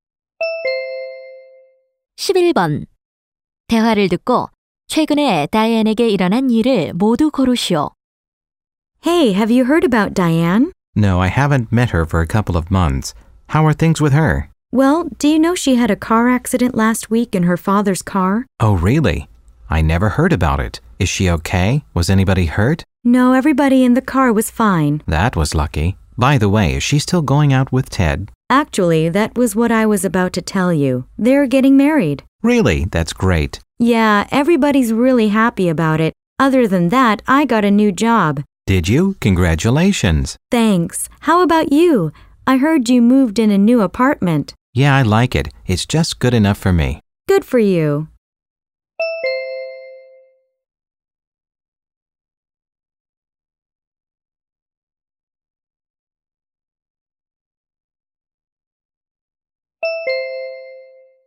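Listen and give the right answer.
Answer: 교통사고가 났고, 테드와 결혼하게 되었다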